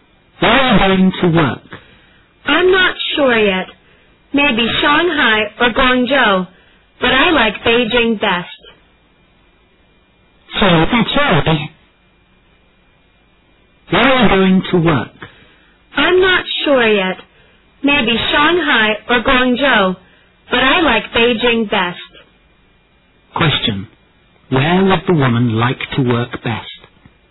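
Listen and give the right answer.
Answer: Beijing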